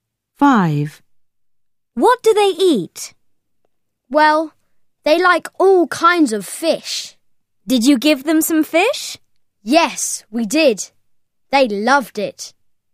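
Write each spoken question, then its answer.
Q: What do they eat?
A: fish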